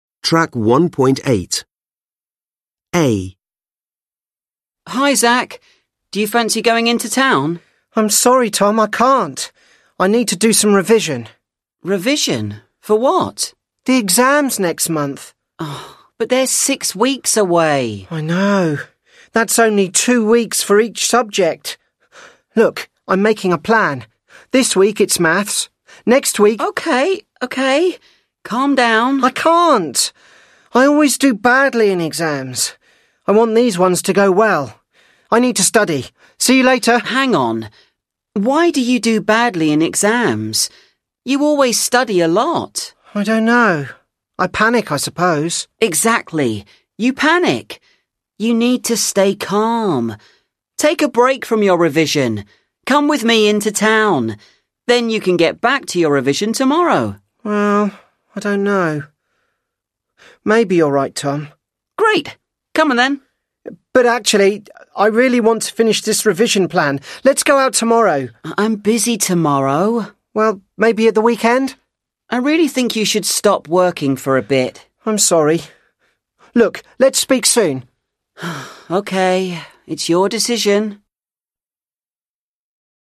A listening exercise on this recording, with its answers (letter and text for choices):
Read the Listening Strategy above and the three summaries of a dialogue below. Then listen to the dialogue. Which is the best summary?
Which is the best summary?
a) Zak refuses to go out with Tom because he's disappointed about his exam results.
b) Zak is anxious about his exams and decides not to go out with Tom.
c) Zak is relieved that his exams are six weeks away and agrees to go out with Tom.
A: b) Zak is anxious about his exams and decides not to go out with Tom.

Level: Lớp 10